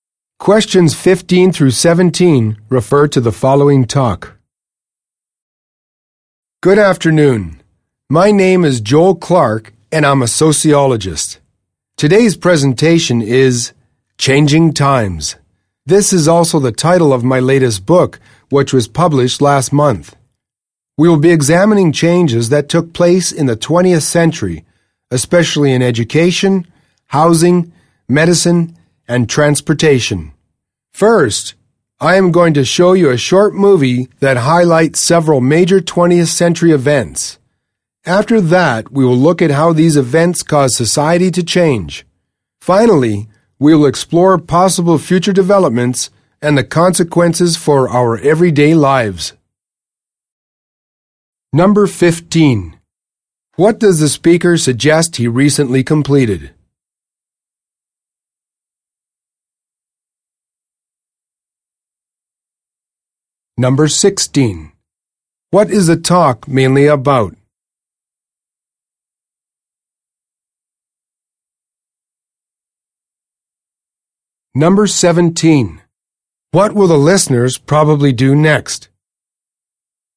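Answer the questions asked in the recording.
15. A book
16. Changes in society in the 20th century
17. Watch a short movie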